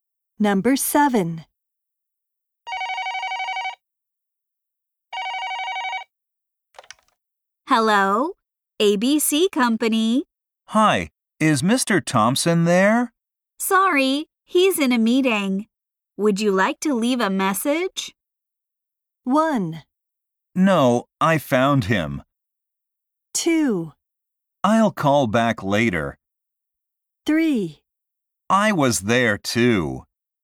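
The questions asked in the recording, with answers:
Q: Sorry, he's in a meeting. Would you like to leave a message?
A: 2: I'll call back later.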